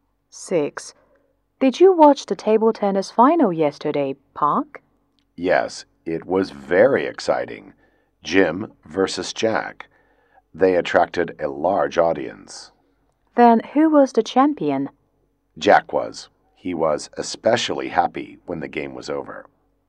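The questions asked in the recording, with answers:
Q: who won the table tennis final?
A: Jack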